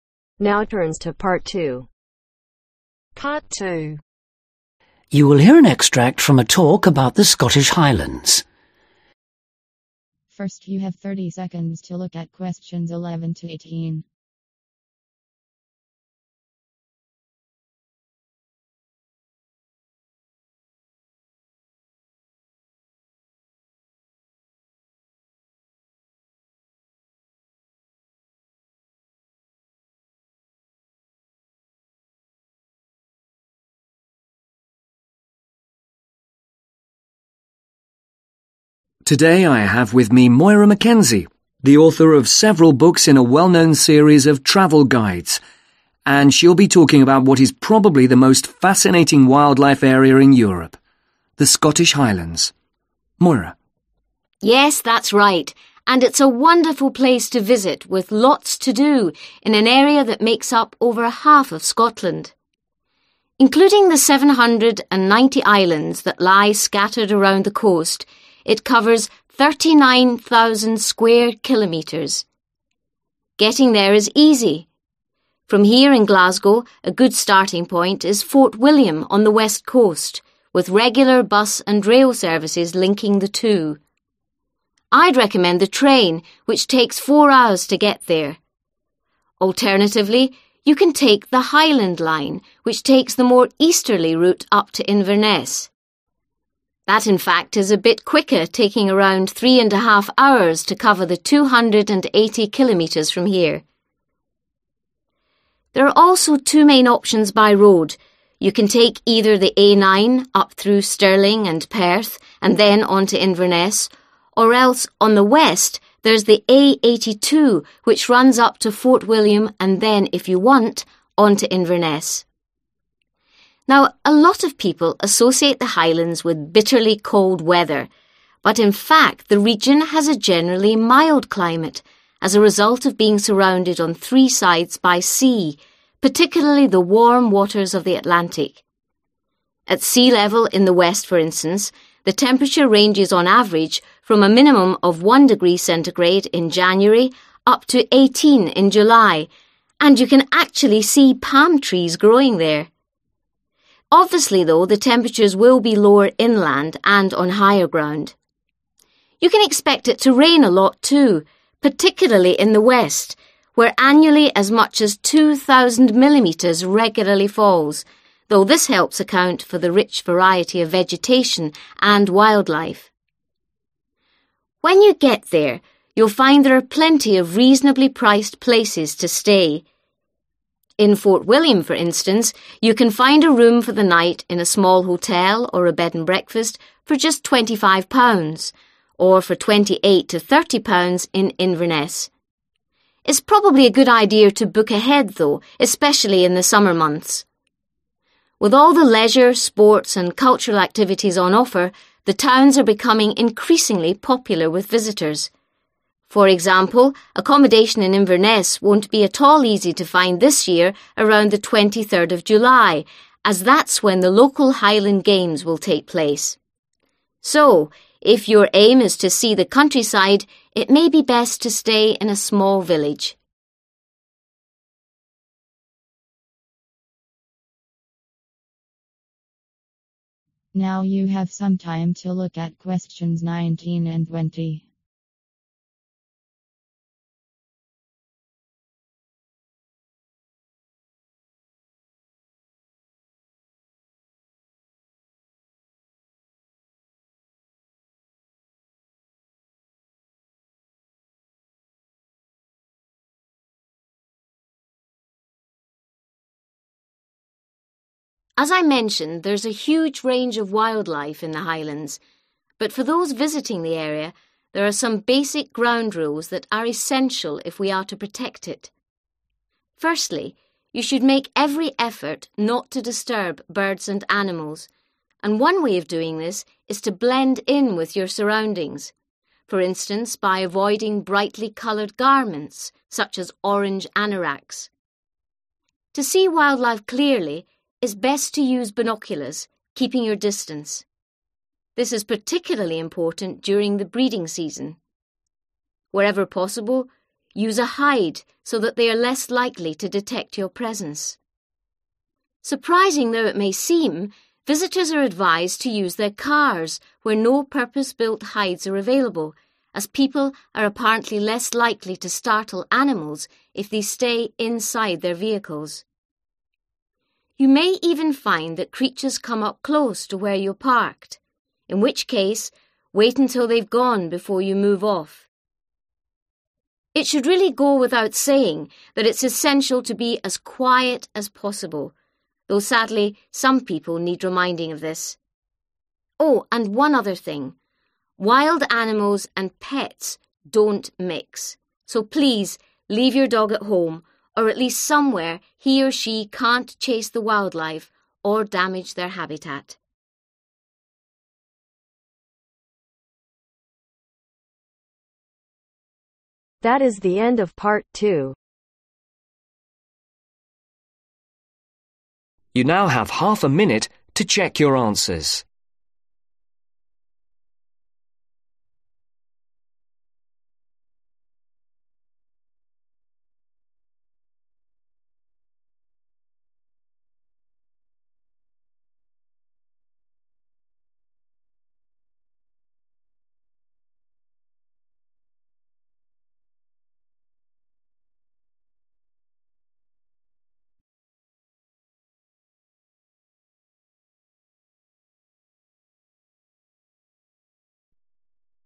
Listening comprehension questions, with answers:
Complete the notes below. Write NO MORE THAN TWO WORDS OR A NUMBER for each answer.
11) Total area (with islands) : (11)............ sq. km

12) Glasgow to Fort William: 174 km. journey time: (12)............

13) Glasgow to Inverness: (13)............ km.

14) Glasgow to Fort William: take the (14)............ road.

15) (15)............ 0C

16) Average rainfall (West Coast): (16)............ mm /year.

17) Fort William: (17).............. per night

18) Highland games (Date: (18)............. )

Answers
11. 39000
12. 4 hours
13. 280
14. A82
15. 18
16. 2000
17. £25
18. 23 July